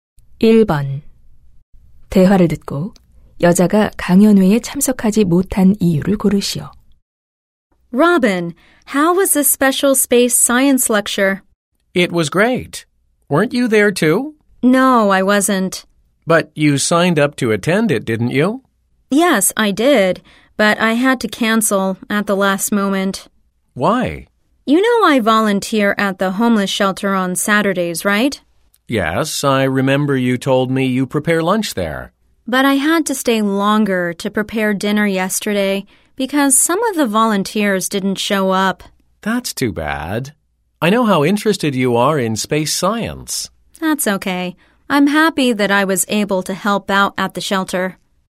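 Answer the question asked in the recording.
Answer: 봉사자들이 오지 않아 노숙자 쉼터에서 저녁 준비를 도와야 해서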